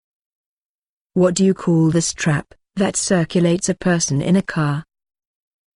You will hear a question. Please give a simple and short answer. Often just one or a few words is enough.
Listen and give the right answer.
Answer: Seatbelt